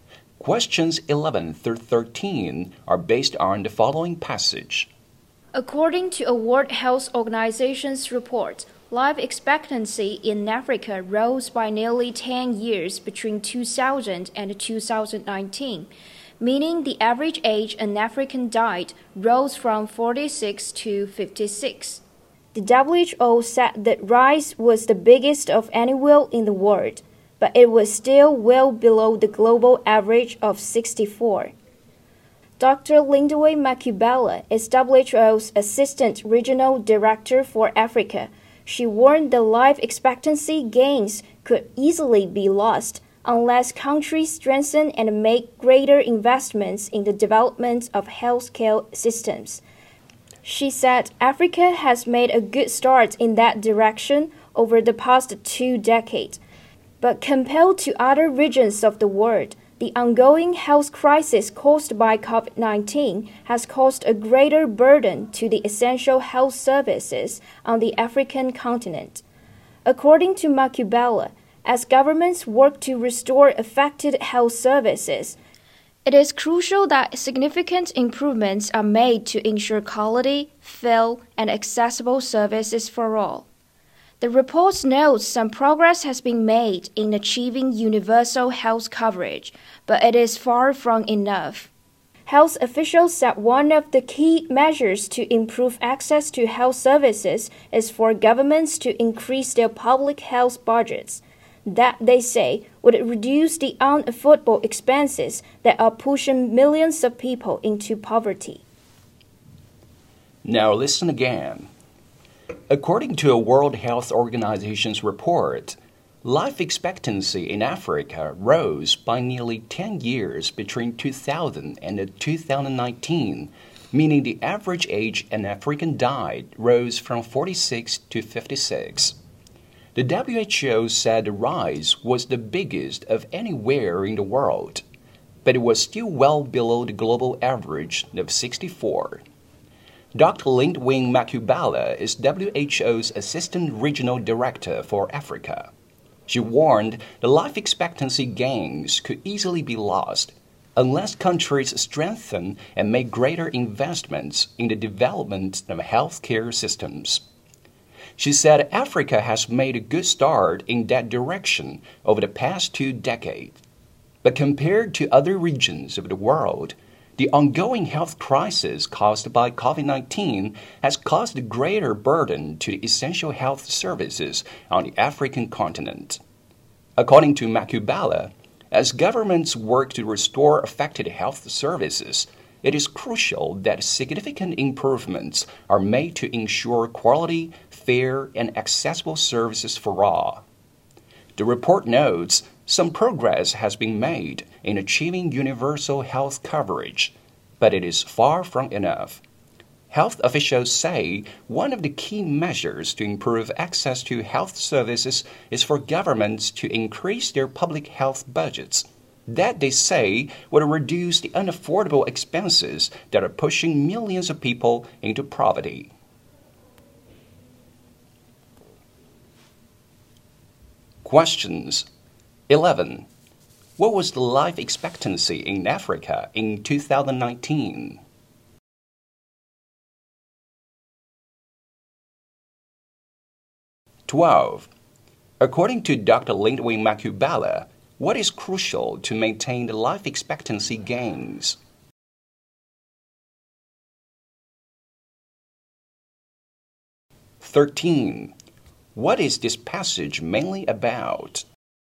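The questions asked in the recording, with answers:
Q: What was the life expectancy in Africa in 2019?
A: 56

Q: According to Dr. Lindwin Makubela, what is crucial to maintain the life expectancy gains?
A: Investing more in and strengthening healthcare systems

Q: What is this passage mainly about?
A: Rising life expectancy in Africa and the need for better healthcare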